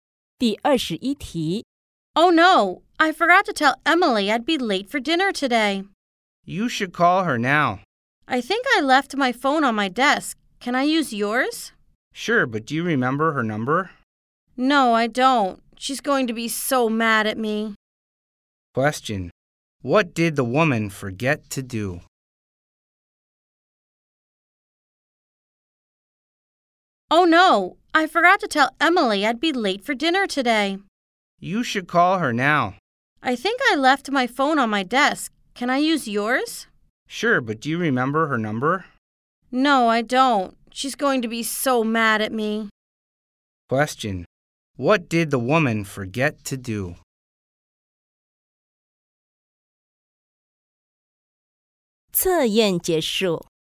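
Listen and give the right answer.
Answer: Tell Emily she'd be late for dinner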